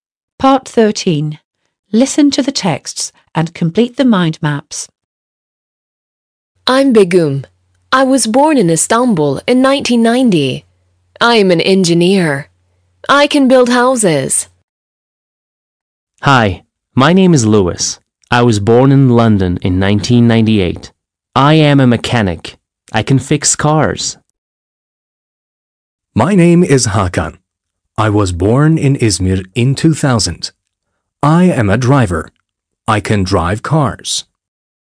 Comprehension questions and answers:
13. Listen to the texts and complete the mind maps.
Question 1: Luis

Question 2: Hakan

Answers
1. London — 1998 — mechanic — fix cars
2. İzmir — 2000 — driver — drive cars

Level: 6. Sınıf